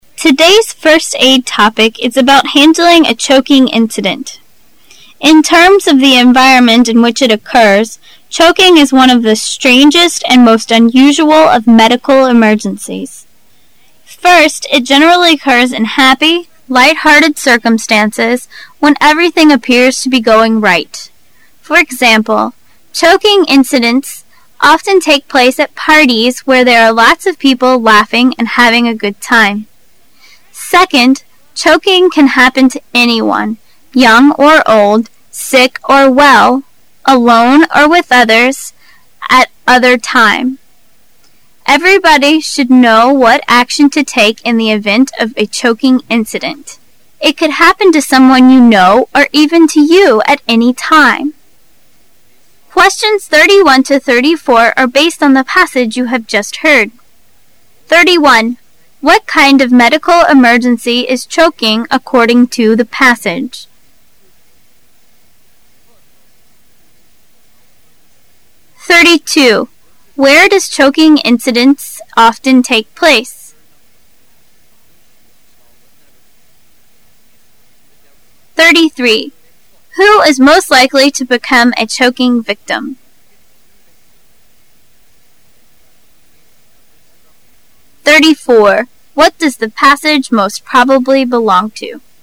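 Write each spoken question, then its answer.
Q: What kind of medical emergency is choking according to the passage?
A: One of the strangest and most unusual medical emergencies

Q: Where does choking incidents often take place?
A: At parties

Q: Who is most likely to become a choking victim?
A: Anyone

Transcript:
[解析] 31-34 Today's first-aid topic is about handling a choking incident. In terms of the environment in which it occurs, choking is one of the strangest and most unusual of medical emergencies. First, it generally occurs in happy, lighthearted circumstances, when everything appears to be going right. For example, choking incidents often take place at parties, where there are lots of people laughing and having a good time. Second, choking can happen to anyone, young or old, sick or well, alone or with others, at other time. Everybody should know what action to take in the event of a choking incident. 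It could happen to someone you know, or even to you, at any time.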